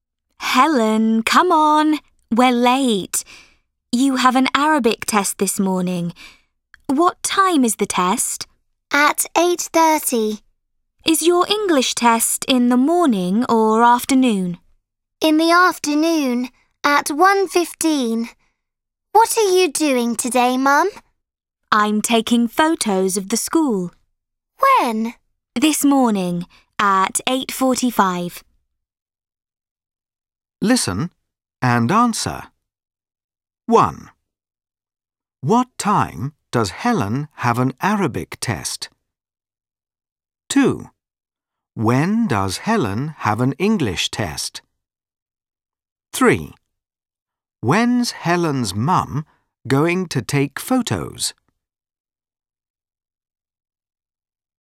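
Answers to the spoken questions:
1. At 8:30
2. In the afternoon, at 1:15
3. This morning, at 8:45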